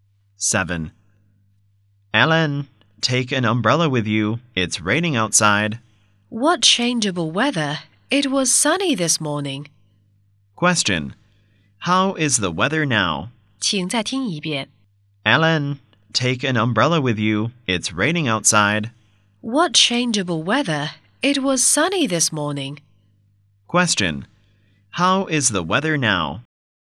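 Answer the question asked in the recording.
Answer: It's raining.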